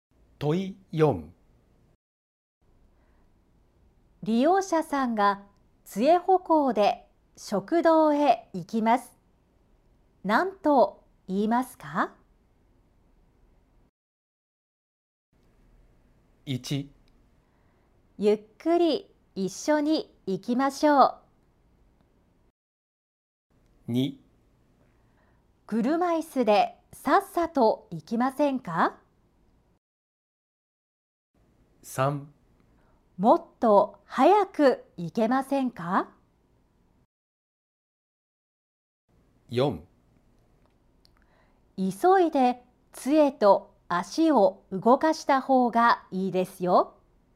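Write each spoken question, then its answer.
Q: 利用者さんが杖歩行で食堂へ行きます。何と言いますか?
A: 1: ゆっくり一緒に行きましょう。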